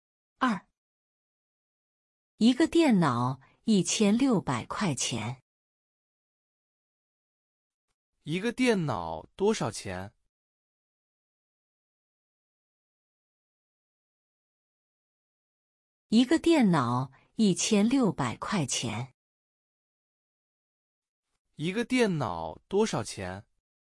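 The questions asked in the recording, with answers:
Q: 一个电脑多少钱?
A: 1600块钱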